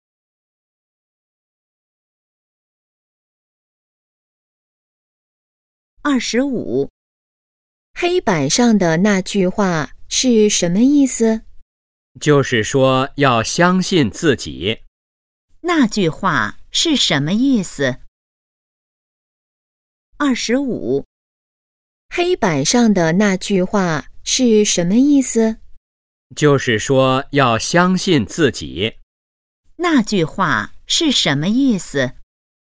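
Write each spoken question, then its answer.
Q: 那句话是什么意思?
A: 要相信自己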